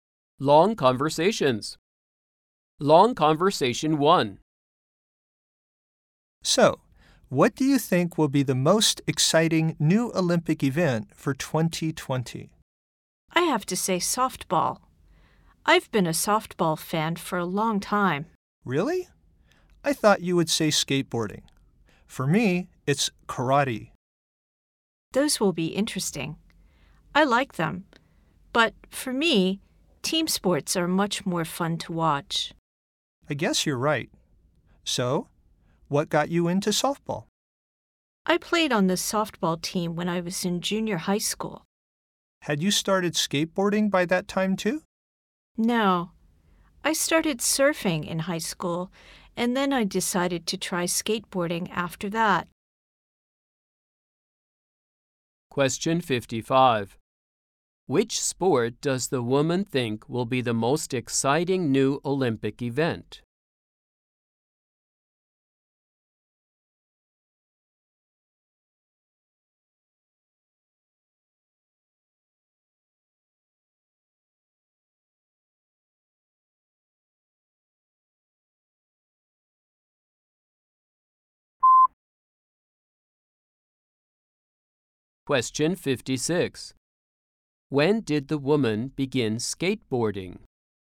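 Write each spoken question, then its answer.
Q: When did the woman begin skateboarding?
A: After she started surfing in high school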